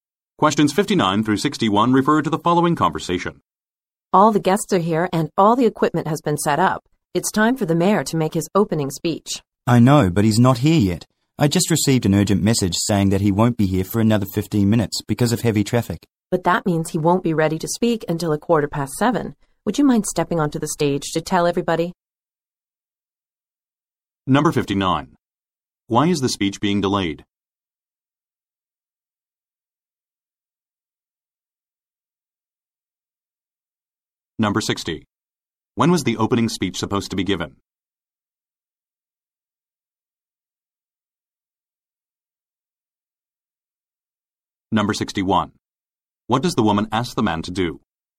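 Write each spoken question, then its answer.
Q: Why is the speech being delayed?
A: The mayor is stuck in heavy traffic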